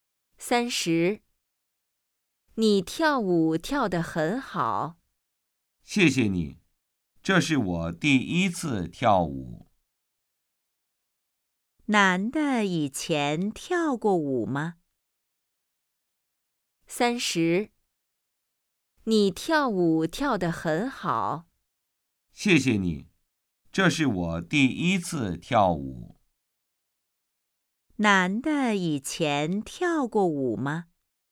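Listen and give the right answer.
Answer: 没有,这是第一次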